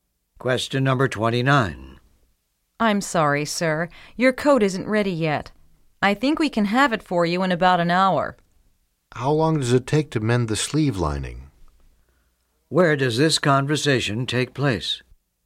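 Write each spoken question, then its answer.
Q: Where does this conversation take place?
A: At a tailor's shop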